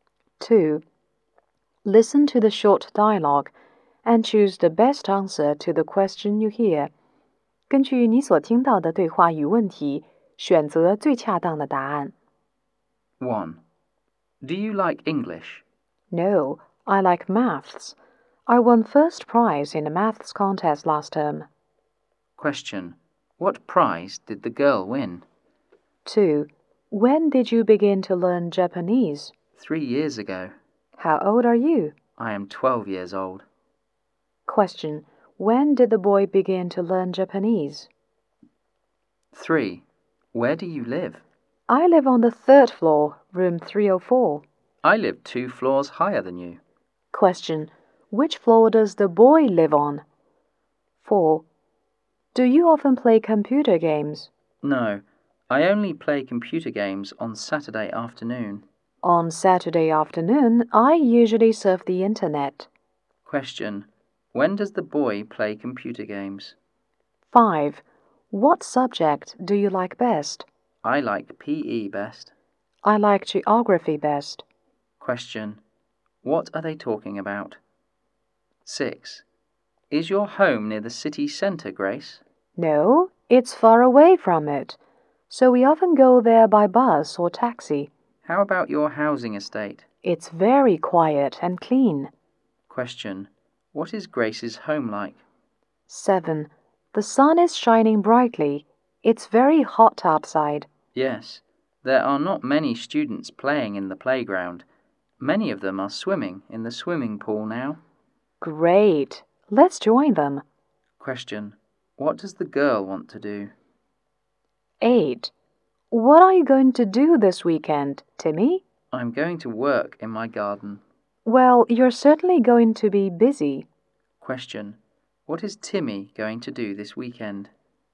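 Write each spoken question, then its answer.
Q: Question. What prize did the girl win?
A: First prize in a maths contest

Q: Question. When did the boy begin to learn Japanese?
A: 3 years ago, at age 9

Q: Question. What are they talking about?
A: Their favourite subjects

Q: Question. What does the girl want to do?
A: Go swimming

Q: Question. What is Timmy going to do this weekend?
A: Work in his garden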